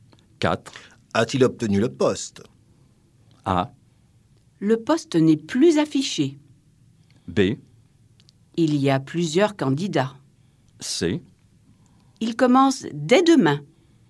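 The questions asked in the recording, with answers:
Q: A-t-il obtenu le poste?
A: C: Il commence dès demain.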